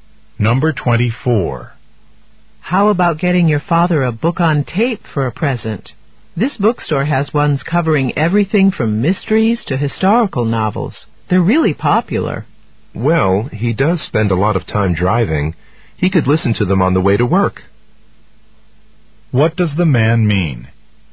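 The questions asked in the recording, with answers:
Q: What does the man mean?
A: A book on tape is a good gift for his father.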